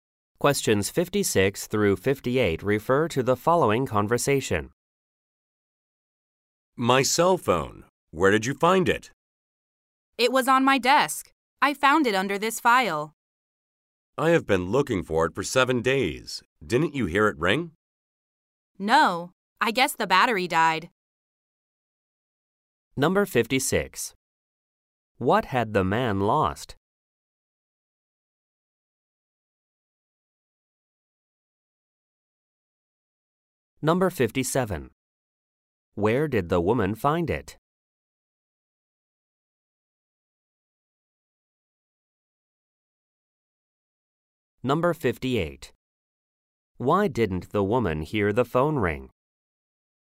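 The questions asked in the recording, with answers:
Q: What had the man lost?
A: His cell phone

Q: Where did the woman find it?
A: On her desk, under a file

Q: Why didn't the woman hear the phone ring?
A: The battery died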